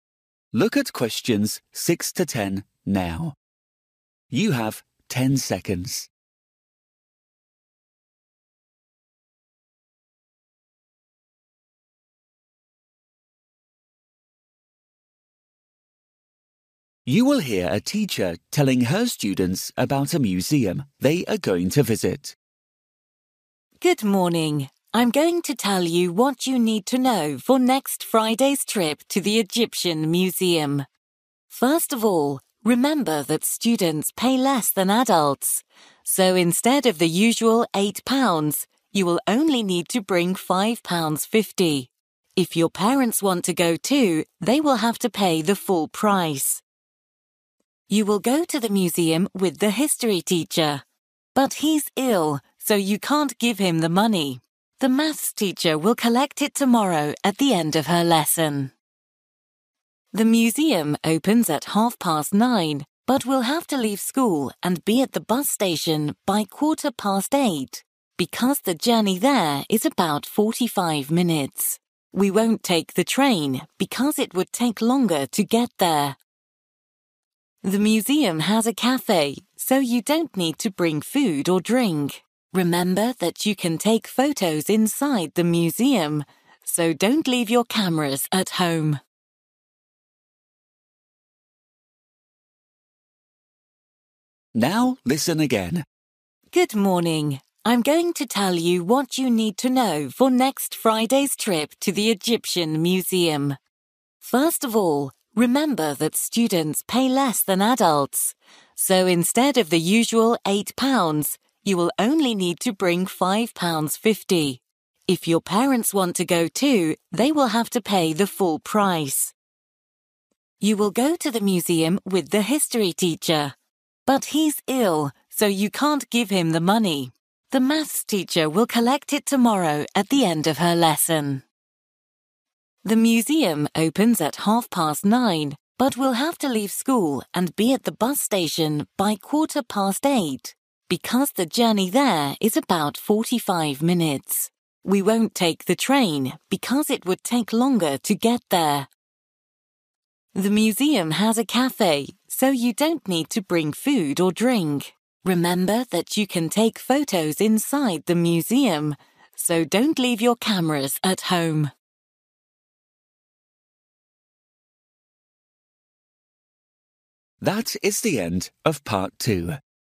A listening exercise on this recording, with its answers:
For each question, write the correct answer in the gap. Write one word or a number or a date or a time.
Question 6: Cost of the ticket (students):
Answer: 5.50

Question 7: Give money to:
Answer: Maths

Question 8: Time to leave school:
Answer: 8:15

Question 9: Travel by:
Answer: bus

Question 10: Bring:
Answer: cameras

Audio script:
Good Morning, I'm going to tell you what you need to know for next Friday's trip to the Egyptian Museum. First of all, remember that students pay less than adults, so instead of the usual 8 pounds you will only need to bring 5 pounds fifty; if your parents want to go too, they will have to pay the full price.
You will go to the museum with the history teacher but he's ill so you can't give him the money. The Maths teacher will collect it tomorrow at the end of her lesson.
The Museum opens at half past nine, but we'll have to leave school and be at the bus station by quarter past eight because the journey there is about 45 minutes. We won't take the train because it would take longer to get there.
The Museum has a café so you don't need to bring food or drink. Remember that you can take photos inside the museum so don't leave your cameras at home.

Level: KET (A2)